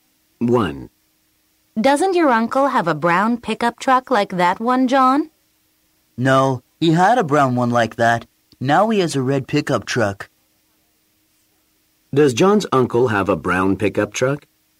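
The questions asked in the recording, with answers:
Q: Does John's uncle have a brown pickup truck?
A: No, he has a red pickup truck.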